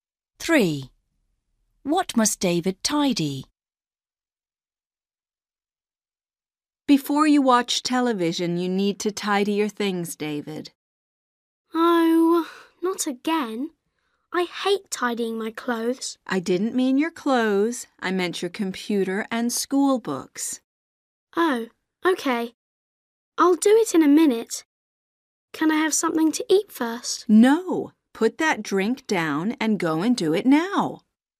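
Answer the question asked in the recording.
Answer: his computer and school books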